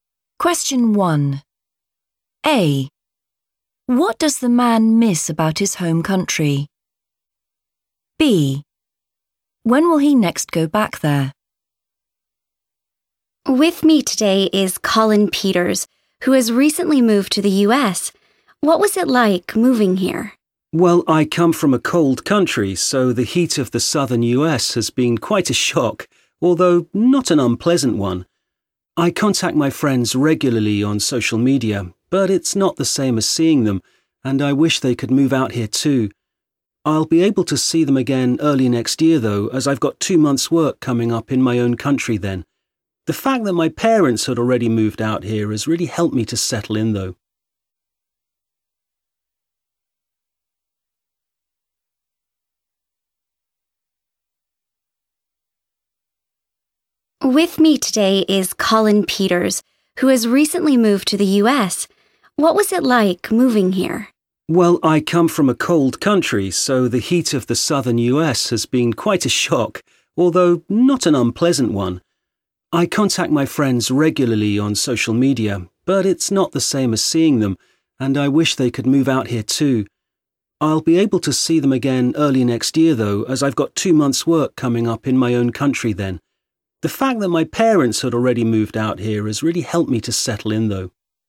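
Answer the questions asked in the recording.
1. his friends
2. early next year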